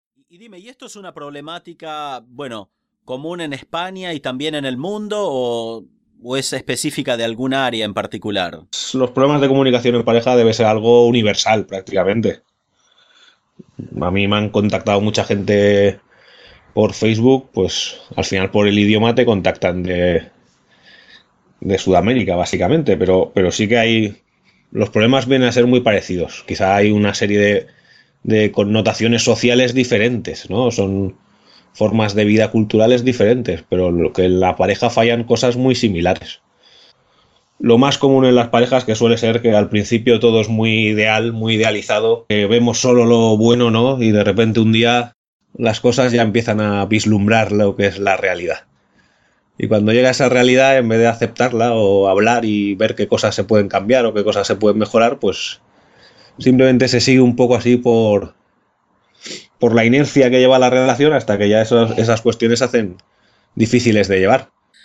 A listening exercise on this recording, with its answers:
Listen to the audio as many times as you need to understand the gist of it. Then click on the tab below and decide whether the statements are True or False. Listen as many times as you need.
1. Este Psicólogo cree que los problemas de pareja son más comunes en Latinoamérica.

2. Él cree que aunque el contexto social sean diferente, las parejas de todo el mundo tienen problemas similares.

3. Según Sabal, al principio de muchas relaciones, las personas ven todo color de rosa.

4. Muchas parejas no hacen nada para cambiar lo que no les gusta en su relación.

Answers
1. Falso
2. Verdadero
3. Verdadero
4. Verdadero

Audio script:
– Y dime ¿esto es una problemática, bueno, común en España y también en el mundo o es específica de algún área en particular?
-Los problemas de comunicación en pareja debe(sic) ser algo universal, prácticamente. A mí me han(sic) contactado mucha gente por Facebook, pues, al final por el idioma te contactan de Sudamérica, básicamente. Pero sí que hay, los problemas vienen a ser muy parecidos. Quizás hay una serie de connotaciones sociales diferentes, ¿no? Son formas de vida culturales diferentes, pero que la pareja falla en cosas muy similares.
Lo más común en las parejas que suele ser que al principio todo es muy ideal, muy idealizado, que vemos solo lo bueno, ¿no? y de repente un día las cosas ya empiezan a vislumbrar lo que es la realidad. Y cuando llega esa realidad, en vez de aceptarla, o hablar y ver qué cosas se pueden cambiar o qué cosas se pueden mejorar, pues simplemente se sigue un poco así por, por la inercia que lleva la relación hasta que ya esas cuestiones se hacen difíciles de llevar.

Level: Advanced